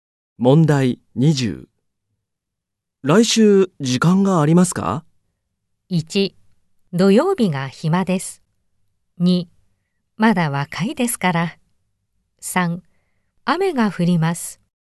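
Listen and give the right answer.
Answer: 1: 土曜日が暇です。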